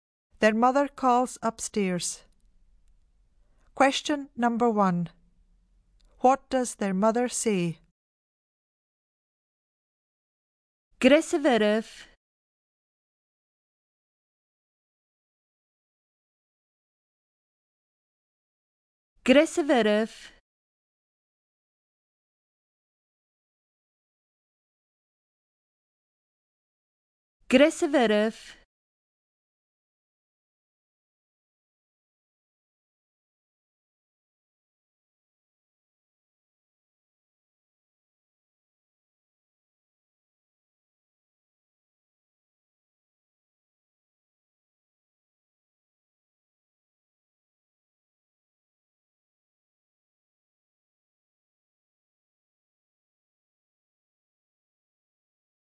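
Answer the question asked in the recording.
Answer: Hurry up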